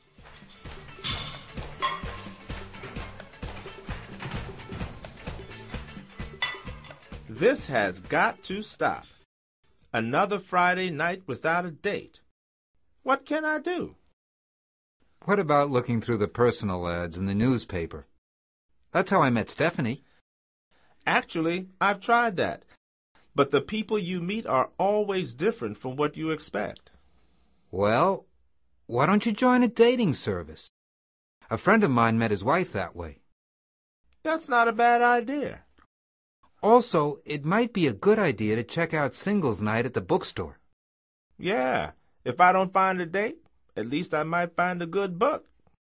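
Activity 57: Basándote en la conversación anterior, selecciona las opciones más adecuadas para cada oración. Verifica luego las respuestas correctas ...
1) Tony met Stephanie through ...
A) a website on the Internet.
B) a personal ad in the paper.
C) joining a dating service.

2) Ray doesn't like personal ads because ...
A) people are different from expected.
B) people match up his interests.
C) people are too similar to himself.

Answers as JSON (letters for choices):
{"1": "B", "2": "A"}

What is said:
This has got to stop! Another Friday night without a date! What can I do?
What about looking through the personal ads in the newspaper? That's how I met Stephanie.
Actually, I've tried that. But the people you meet are always different from what you expect.
Well, why don't you join a dating service? A friend of mine met his wife that way.
That's not a bad idea.
Also, it might be a good idea to check out singles' night at the bookstore.
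Yeah. If I don't find a date, at least I might find a good book!

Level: Nivel Avanzado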